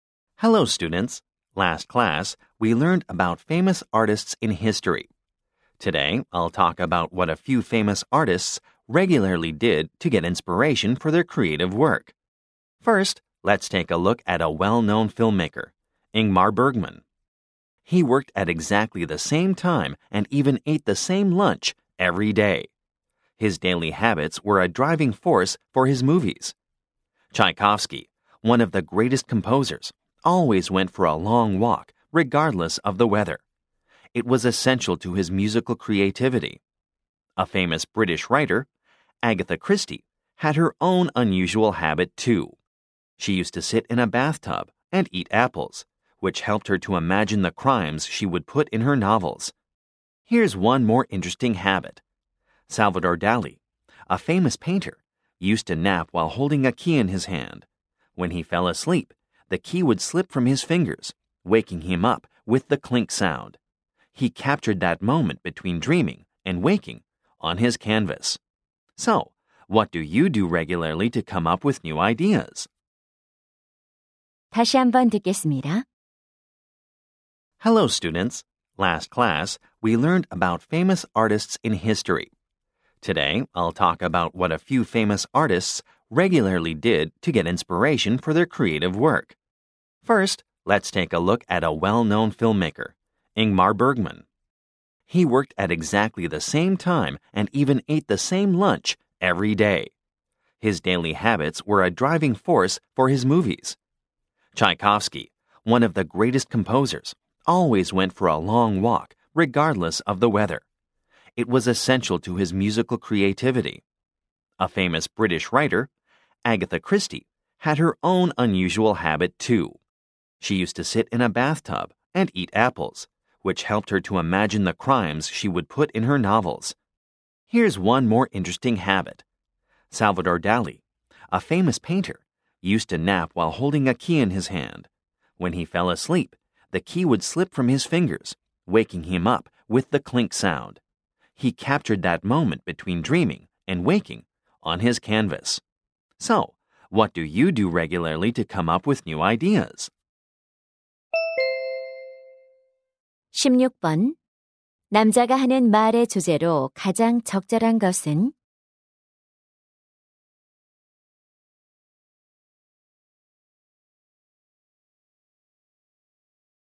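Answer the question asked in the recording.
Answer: 유명 예술가들이 영감을 얻기 위해 규칙적으로 한 습관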